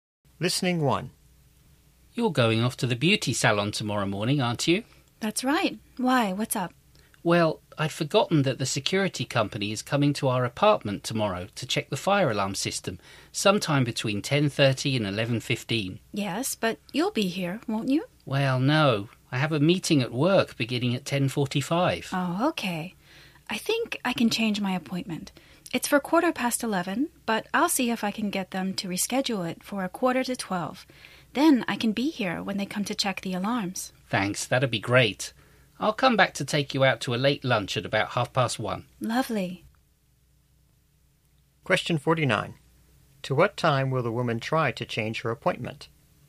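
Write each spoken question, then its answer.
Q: To what time will the woman try to change her appointment?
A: 11:45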